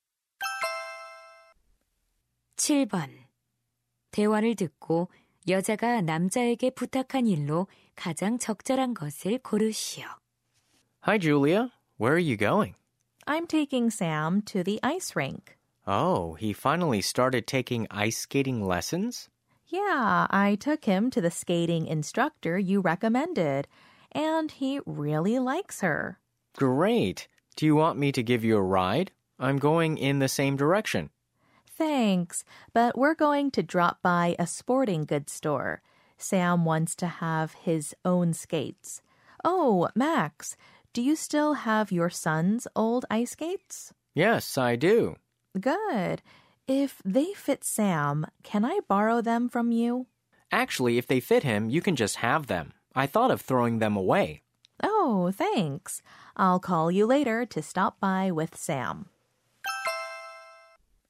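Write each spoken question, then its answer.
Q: 대화를 듣고 여자가 남자에게 부탁한 일로 가장 적절한 것을 고르시오.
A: 아들의 옛 스케이트 빌려주기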